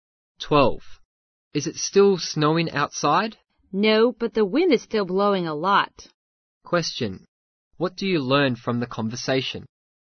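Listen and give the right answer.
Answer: It has stopped snowing but it is still very windy.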